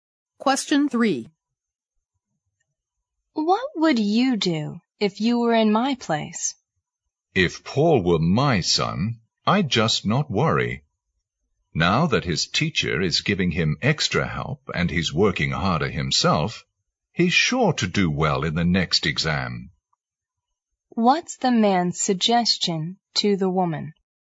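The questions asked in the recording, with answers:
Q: What's the man's suggestion to the woman?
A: She shouldn't worry about Paul.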